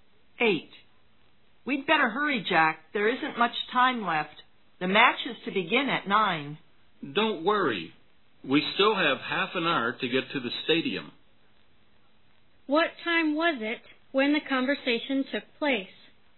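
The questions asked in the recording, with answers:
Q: What time was it when the conversation took place?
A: 8:30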